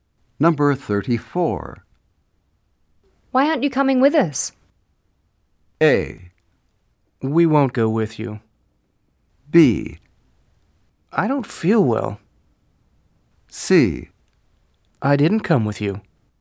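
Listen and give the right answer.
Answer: B: I don't feel well.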